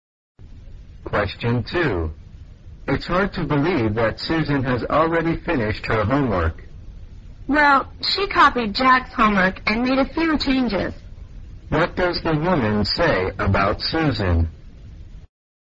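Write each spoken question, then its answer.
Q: What does the woman say about Susan?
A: Susan copied Jack's homework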